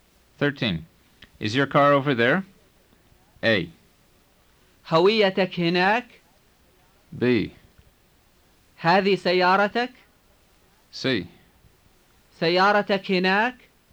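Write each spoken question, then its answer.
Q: Is your car over there?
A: C: سيارتك هناك؟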